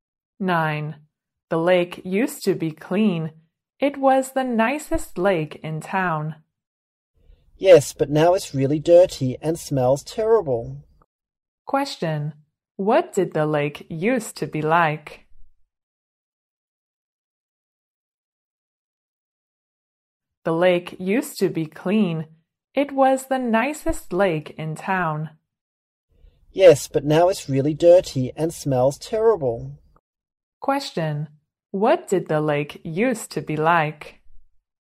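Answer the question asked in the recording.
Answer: Clean; the nicest lake in town.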